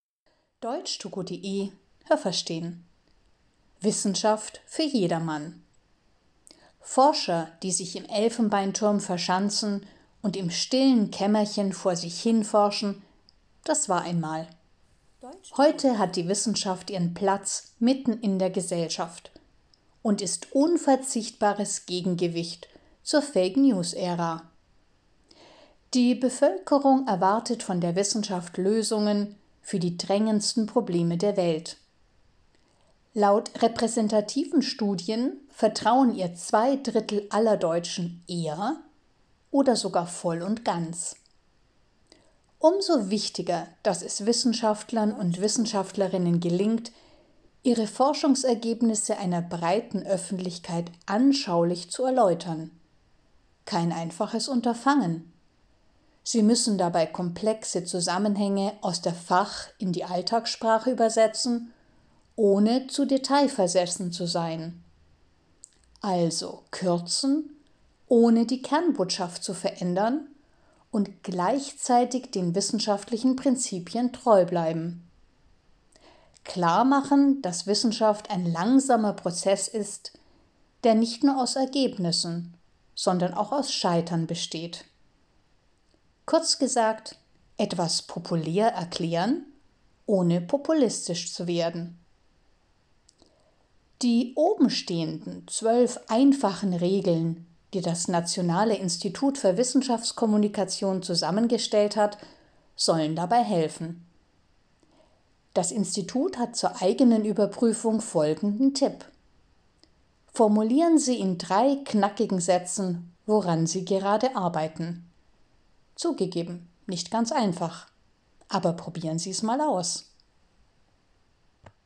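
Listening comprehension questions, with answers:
Haben Sie das gehört? Stimmt diese Aussage?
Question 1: Die Wissenschaft hatte ihren Platz immer schon inmitten der Gesellschaft.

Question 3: Die Mehrzahl der Deutschen vertraut der Wissenschaft und erwartet von ihr Lösungsvorschläge für die Probleme der Welt.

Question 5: Wissenschaftler dürfen bei ihren anschaulichen Erläuterungen keine noch so kleinen Details vergessen.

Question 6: Beim Kürzen bewahren Wissenschaftler die Kernbotschaft und dürfen notfalls wissenschaftliche Prinzipien über Bord werfen.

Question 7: Der Weg der Wissenschaft verläuft nicht immer geradlinig, es gehören auch Rückschläge und Misserfolge dazu.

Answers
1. falsch
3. richtig
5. falsch
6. falsch
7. richtig

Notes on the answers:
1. Früher arbeiteten Wissenschaftler ganz für sich allein, ohne an die gesellschaftliche und politische Wirklichkeit zu denken. Man sagt, sie saßen in einem Elfenbeinturm.
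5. Sie müssen ihre Kernbotschaft anschaulich erläutern, dürfen aber nicht zu detailversessen sein.
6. Sie müssen auch beim Kürzen den wissenschaftlichen Prinzipien treu bleiben.

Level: C (schwer)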